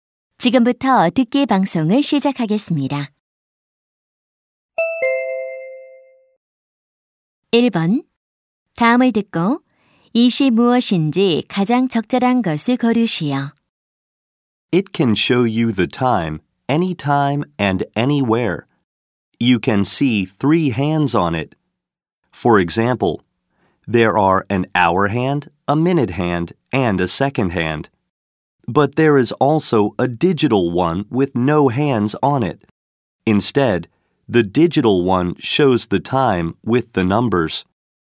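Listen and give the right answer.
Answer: 시계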